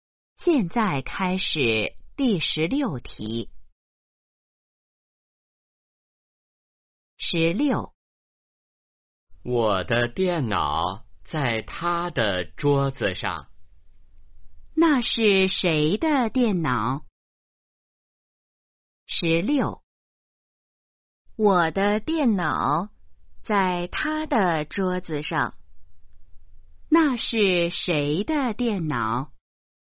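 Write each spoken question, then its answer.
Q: 那是谁的电脑?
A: 我的(说话人的)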